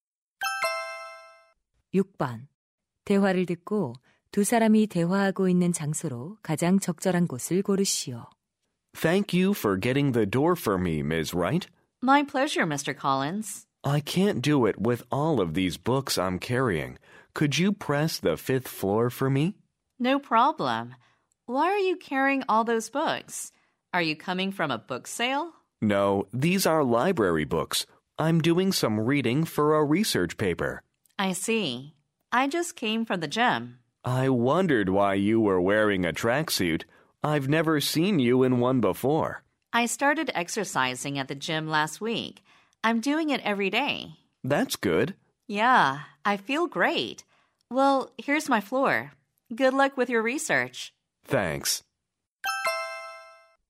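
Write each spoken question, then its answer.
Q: 대화를 듣고 두 사람이 대화하고 있는 장소로 가장 적절한 곳을 고르시오.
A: 엘리베이터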